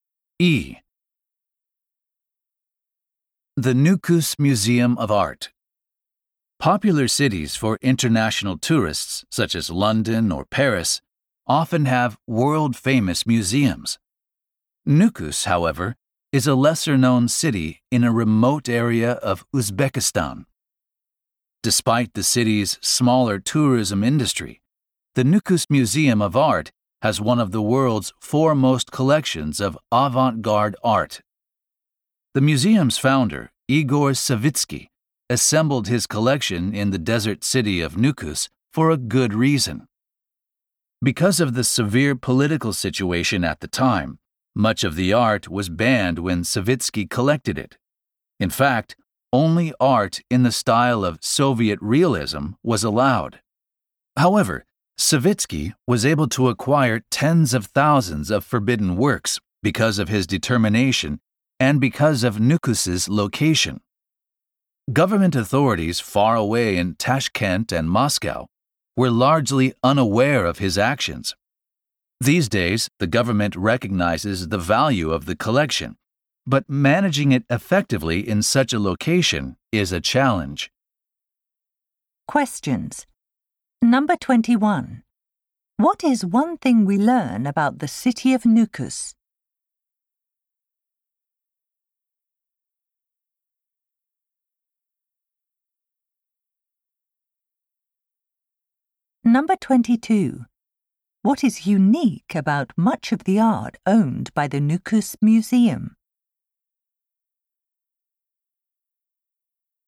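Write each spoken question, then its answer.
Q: What is one thing we learn about the city of Nukus?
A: It is remote, far from the government authorities.

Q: What is unique about much of the art owned by the Nukus Museum?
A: It was banned when it was collected.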